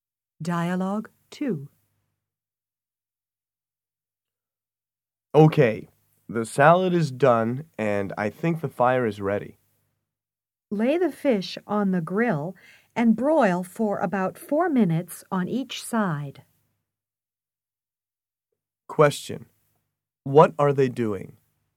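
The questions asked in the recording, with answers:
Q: What are they doing?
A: Preparing a meal: grilling fish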